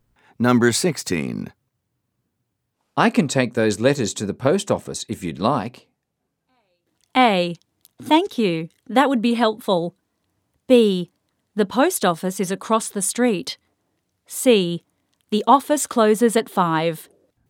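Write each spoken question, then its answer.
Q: I can take those letters to the post office if you'd like.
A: A: Thank you. That would be helpful.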